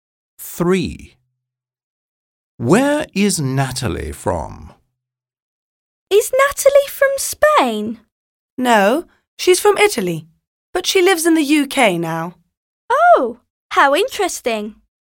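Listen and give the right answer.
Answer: Italy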